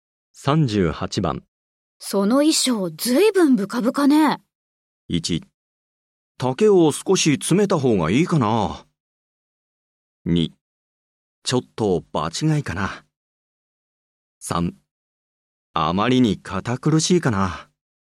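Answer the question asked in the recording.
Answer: 1: 丈を少し詰めた方がいいかな。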